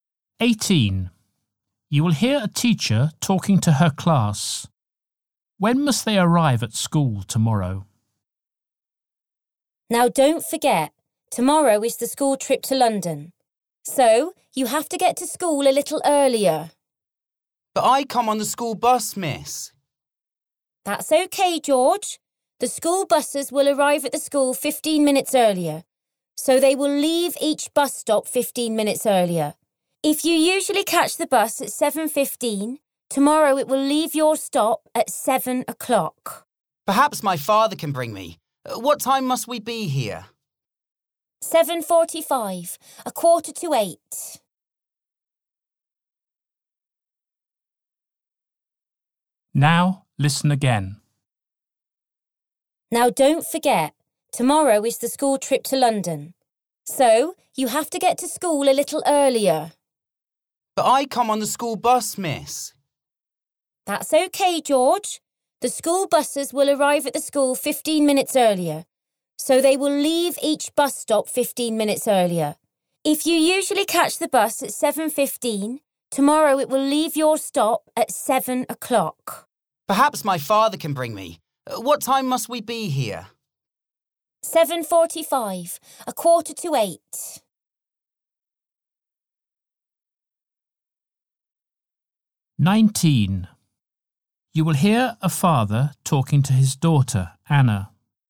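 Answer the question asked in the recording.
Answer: 7:45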